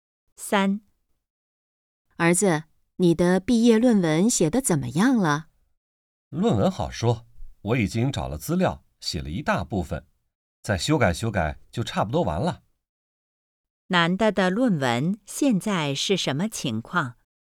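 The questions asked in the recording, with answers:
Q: 男的的论文现在是什么情况?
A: 写了一大部分,再修改修改就差不多完成了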